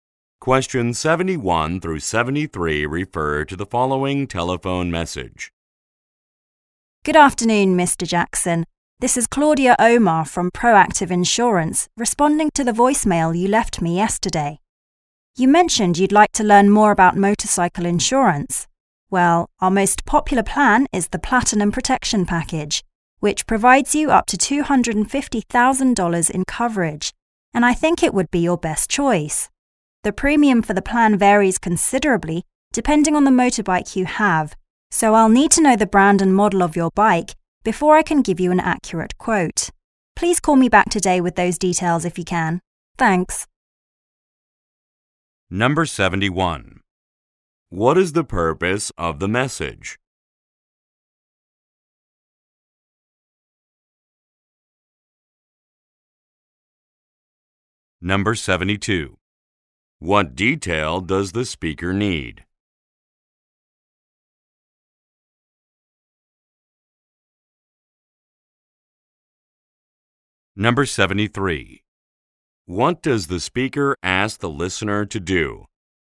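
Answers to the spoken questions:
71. To respond to an inquiry about motorcycle insurance
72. The brand and model of his motorbike
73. Call her back today with the details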